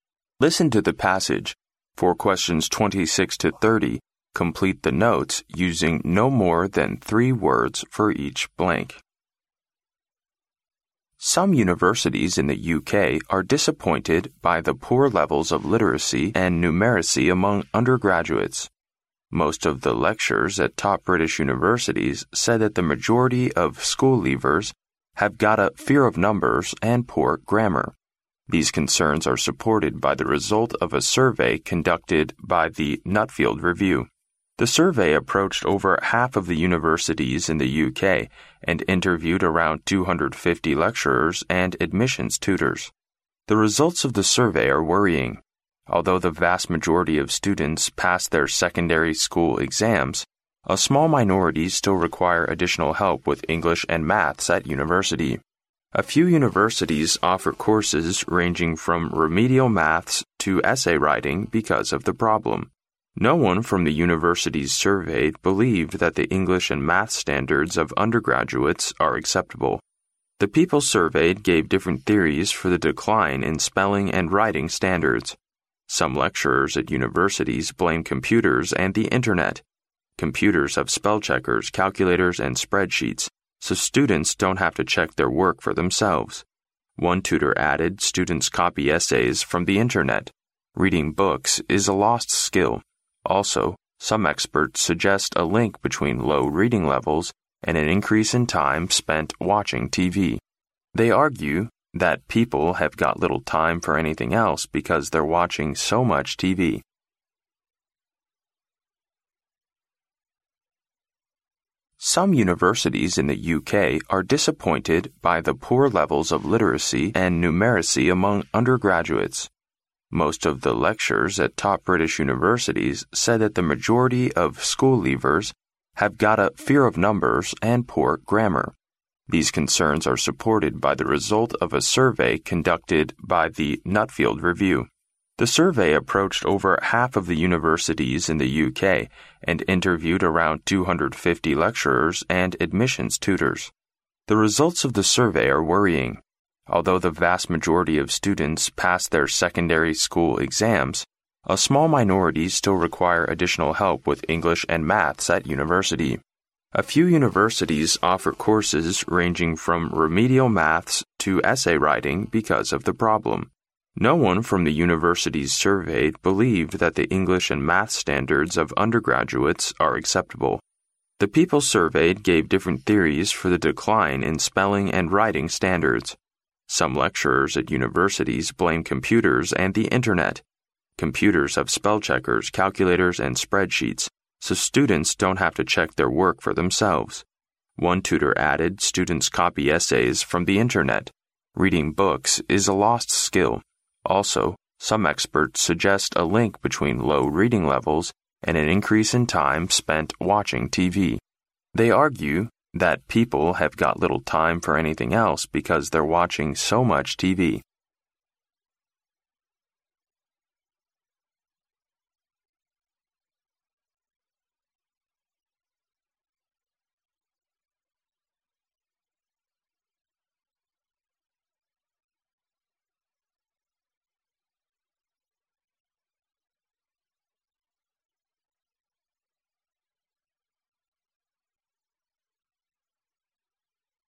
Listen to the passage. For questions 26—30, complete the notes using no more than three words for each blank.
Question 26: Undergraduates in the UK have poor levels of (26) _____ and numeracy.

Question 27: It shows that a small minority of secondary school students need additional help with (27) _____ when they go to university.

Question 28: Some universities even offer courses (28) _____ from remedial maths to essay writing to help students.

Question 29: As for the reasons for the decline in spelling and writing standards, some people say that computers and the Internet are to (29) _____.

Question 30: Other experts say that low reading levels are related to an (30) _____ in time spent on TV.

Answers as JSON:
{"26": "literacy", "27": "English and math(s)", "28": "ranging", "29": "blame", "30": "increase"}

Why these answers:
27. 录音中提到"a small minority still require additional help with English and maths at university."由此可知一小部分学生在英语和数学方面还需额外帮助。因此该空填English and math(s)。
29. 录音中提到"Some lecturers at universities blame computers and the Internet."由此可知有些讲师认为这是电脑和互联网导致的问题。根据该空前的to可推断该空填blame。

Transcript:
Some universities in the UK are disappointed by the poor levels of literacy and numeracy among undergraduates. Most of the lecturers at top British universities say that the majority of school-leavers have got a "fear of numbers" and poor grammar. These concerns are supported by the results of a survey conducted by the Nuffield Review.
The survey approached over half of the universities in the UK, and interviewed around 250 lecturers and admissions tutors. The results of the survey are worrying. Although the vast majority of students pass their secondary school exams, a small minority still require additional help with English and maths at university. A few universities offer courses ranging from remedial maths to essay writing because of the problem. No one from the universities surveyed believed that the English and maths standards of undergraduates are acceptable.
The people surveyed gave different theories for the decline in spelling and writing standards. Some lecturers at universities blame computers and the Internet. Computers have spellcheckers, calculators and spreadsheets, so students don't have to check their work for themselves. One tutor added, "Students copy essays from the Internet. Reading books is a lost skill". Also, some experts suggest a link between low reading levels and an increase in time spent watching TV. They argue that people have got little time for anything else because they're watching so much TV.